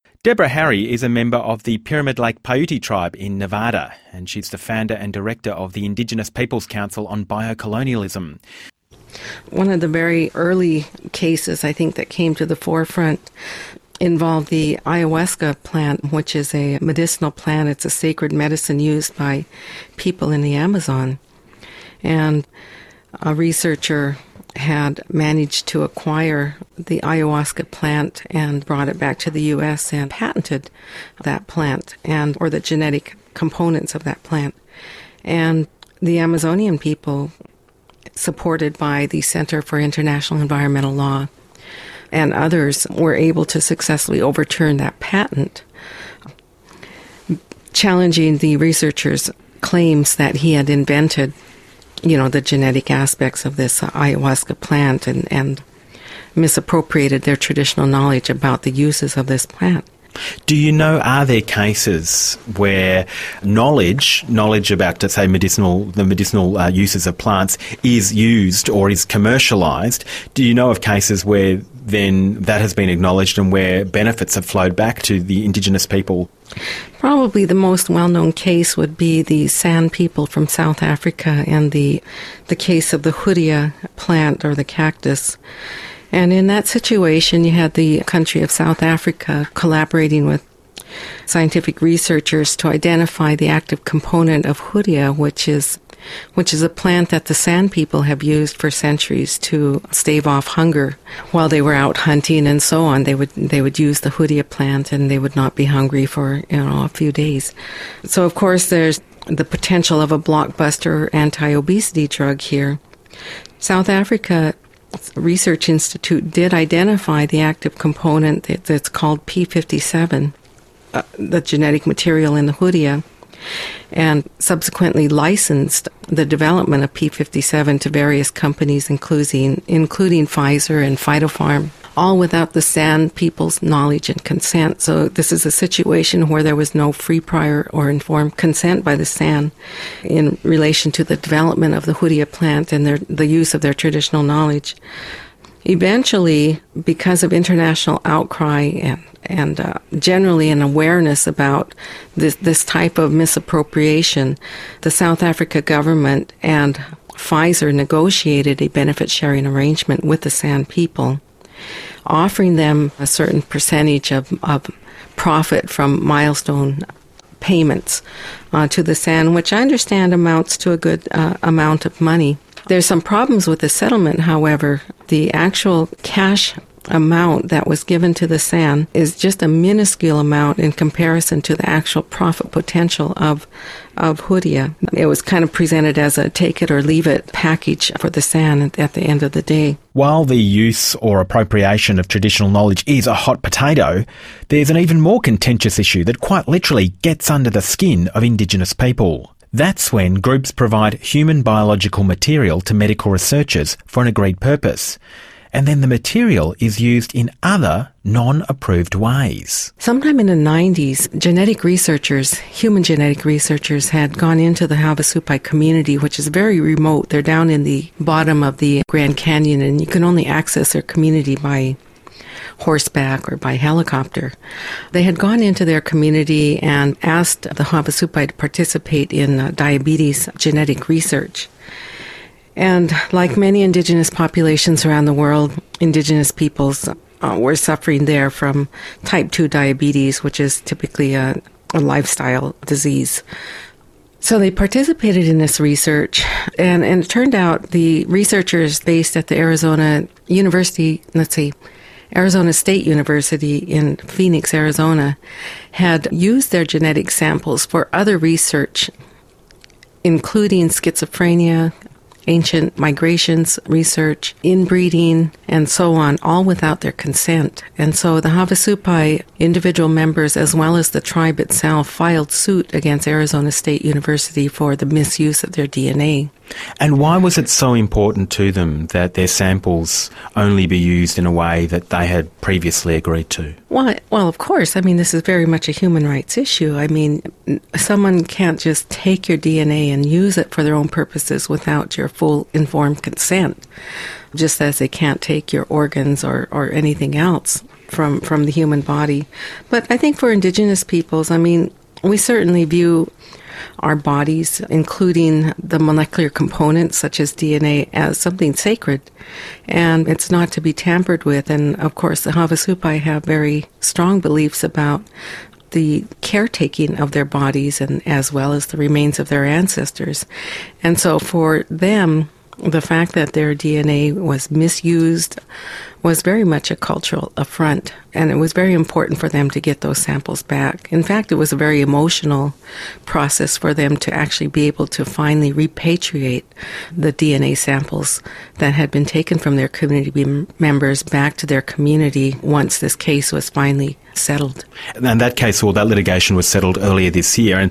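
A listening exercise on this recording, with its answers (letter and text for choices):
You are going to hear an interview broadcast on ABC, an Australian radio station about biopiracy. Listen and choose the best answers.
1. In the Ayahuasca case, the Amazonian people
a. received support from an outside agency.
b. managed to register their own patent.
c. had tried to keep their traditional knowledge about the plant silent.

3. The deal between the San and the company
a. was negotiated on a mutual benefit basis.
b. is the best one possible for both sides.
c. was made due to pressure from overseas.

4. The Havasupai tribe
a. do not suffer from most common diseases.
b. is not easily accessible.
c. was initially unconcerned about the use to which their DNA samples would be put.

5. The DNA material was used for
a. medical research alone.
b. medical and anthropological studies.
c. mental health and other medical research.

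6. For the Havusapais,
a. the misuse of their DNA was sacrilegious.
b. recovering the samples was less important than receiving an apology.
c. it was another example of cultural appropriation.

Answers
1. a. received support from an outside agency.
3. c. was made due to pressure from overseas.
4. b. is not easily accessible.
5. b. medical and anthropological studies.
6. a. the misuse of their DNA was sacrilegious.

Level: EOI_IN6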